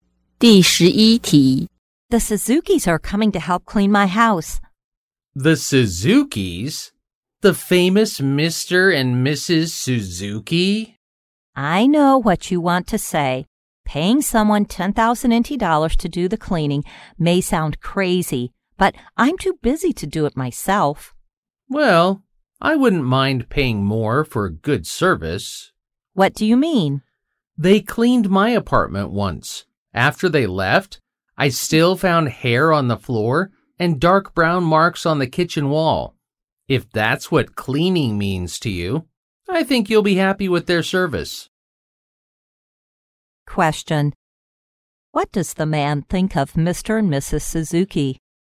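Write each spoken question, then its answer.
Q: What does the man think of Mr.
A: Their cleaning is poor and not worth the price.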